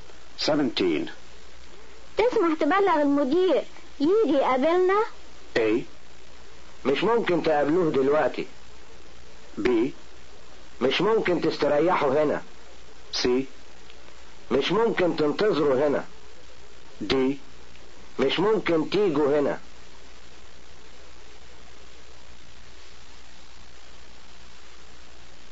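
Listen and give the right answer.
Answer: A: مش ممكن تقابلوه دلوقتي.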